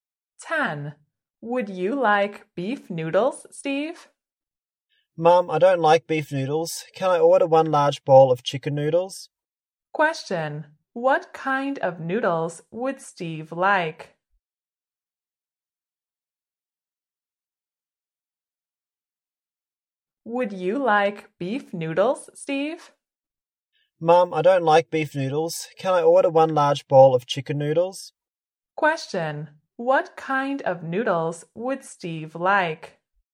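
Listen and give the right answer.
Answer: Chicken noodles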